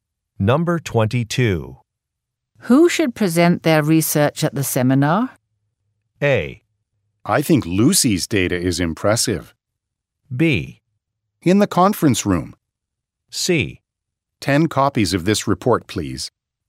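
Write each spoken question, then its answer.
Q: Who should present their research at the seminar?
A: A: I think Lucy's data is impressive.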